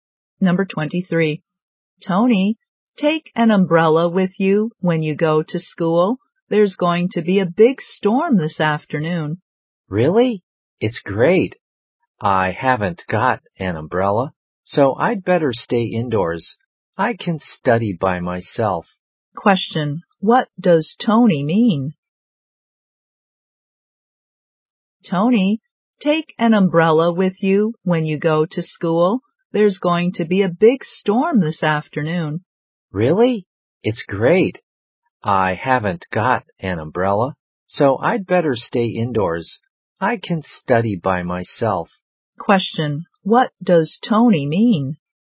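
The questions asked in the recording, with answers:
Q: What does Tony mean?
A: He'd rather stay indoors and study by himself instead of going to school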